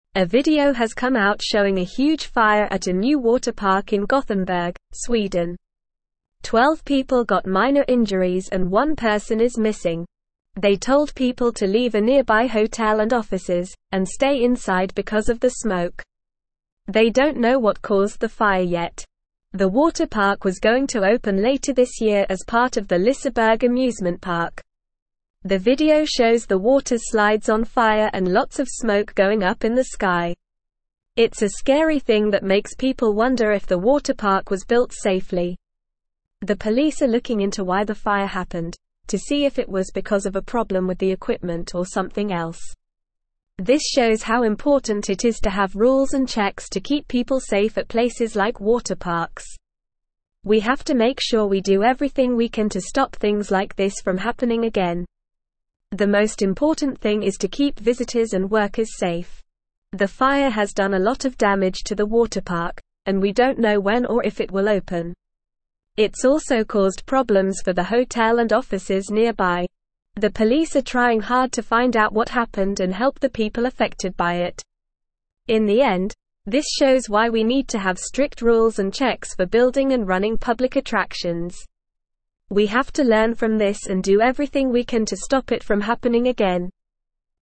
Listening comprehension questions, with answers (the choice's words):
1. What happened at the water park in Gothenburg, Sweden?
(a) A new ride was unveiled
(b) The park opened to the public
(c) The park closed for renovations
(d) A huge fire broke out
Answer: A huge fire broke out

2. How many people were injured in the fire?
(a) Twenty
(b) Five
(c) None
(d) Twelve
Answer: Twelve

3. What did authorities tell people to do because of the fire?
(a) Go to the water park to help with the situation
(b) Leave a nearby hotel and offices, and stay inside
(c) Ignore the smoke and continue with their activities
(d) Evacuate the entire city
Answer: Leave a nearby hotel and offices, and stay inside

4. What caused the fire at the water park?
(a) A problem with the equipment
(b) A natural disaster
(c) It is still unknown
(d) Human error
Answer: It is still unknown

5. What are the police investigating regarding the fire?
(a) The cost of the damages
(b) The cause of the fire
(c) The history of the water park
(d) The popularity of the amusement park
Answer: The cause of the fire

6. What lesson can be learned from this incident?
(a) The importance of safety regulations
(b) The need for more water parks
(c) The benefits of smoke detectors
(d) The dangers of amusement parks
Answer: The importance of safety regulations

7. What impact did the fire have on the water park?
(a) It caused a lot of damage and its opening is uncertain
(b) It had no impact on the park's operations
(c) It led to an increase in visitors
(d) It resulted in the closure of nearby attractions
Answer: It caused a lot of damage and its opening is uncertain

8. Twelve people got (1)______ injuries and one person is missing.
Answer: minor

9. They told people to (2)______ a (3)______ hotel and offices, and stay inside because of the smoke.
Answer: leave

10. They told people to (2)______ a (3)______ hotel and offices, and stay inside because of the smoke.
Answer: nearby

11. They don't know what (4)______ the fire yet.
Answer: caused

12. The video shows the (5)______ slides on fire and lots of smoke going up in the sky.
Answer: water

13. It's a scary thing that (6)______ people wonder if the water park was (7)______ safely.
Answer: makes

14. It's a scary thing that (6)______ people wonder if the water park was (7)______ safely.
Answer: built

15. The police are (8)______ into why the fire happened, to see if it was because of a problem with the equipment or something else.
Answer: looking

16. This shows how important it is to have rules and checks to keep (9)______ safe at places like water parks.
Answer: people

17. We have to make sure we do everything we can to stop things like this from (10)______ again.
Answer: happening

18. The most important thing is to keep (11)______ and (12)______ safe.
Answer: visitors

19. The most important thing is to keep (11)______ and (12)______ safe.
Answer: workers

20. The police are trying hard to find out what happened and help the people (13)______ by it.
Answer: affected

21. In the end, this shows why we need to have (14)______ rules and checks for building and running (15)______ attractions.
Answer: strict

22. In the end, this shows why we need to have (14)______ rules and checks for building and running (15)______ attractions.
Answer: public

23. We have to (16)______ from this and do everything we can to stop it from happening again.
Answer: learn

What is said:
A video has come out showing a huge fire at a new water park in Gothenburg, Sweden. Twelve people got minor injuries and one person is missing. They told people to leave a nearby hotel and offices, and stay inside because of the smoke. They don't know what caused the fire yet. The water park was going to open later this year as part of the Liseberg Amusement Park.
The video shows the water slides on fire and lots of smoke going up in the sky. It's a scary thing that makes people wonder if the water park was built safely. The police are looking into why the fire happened, to see if it was because of a problem with the equipment or something else.
This shows how important it is to have rules and checks to keep people safe at places like water parks. We have to make sure we do everything we can to stop things like this from happening again. The most important thing is to keep visitors and workers safe.
The fire has done a lot of damage to the water park, and we don't know when or if it will open. It's also caused problems for the hotel and offices nearby. The police are trying hard to find out what happened and help the people affected by it.
In the end, this shows why we need to have strict rules and checks for building and running public attractions. We have to learn from this and do everything we can to stop it from happening again.

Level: Level 3